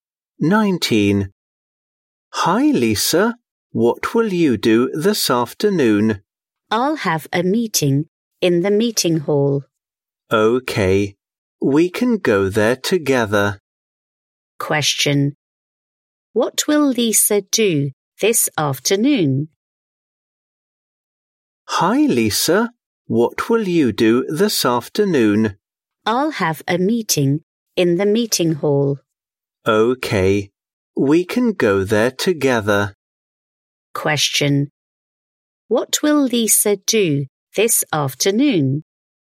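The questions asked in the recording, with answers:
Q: Question. What will Lisa do this afternoon?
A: Have a meeting in the meeting hall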